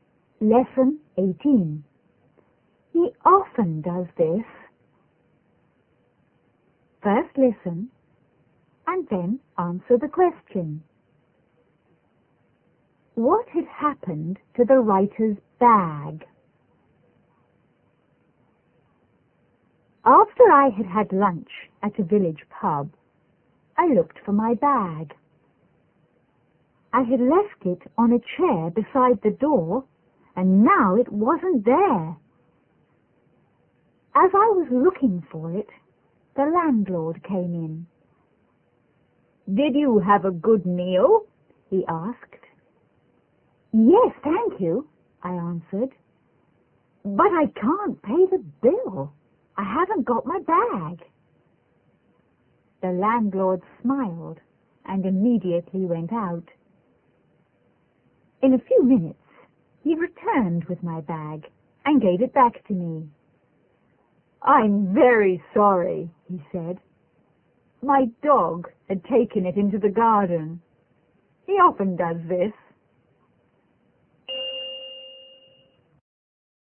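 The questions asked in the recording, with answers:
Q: What had happened to the writer's bag?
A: The landlord's dog had taken it into the garden.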